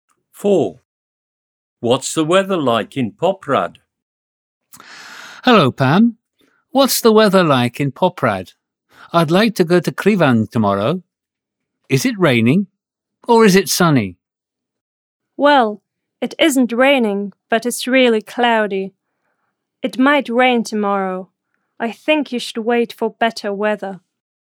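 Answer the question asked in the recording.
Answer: Cloudy, not raining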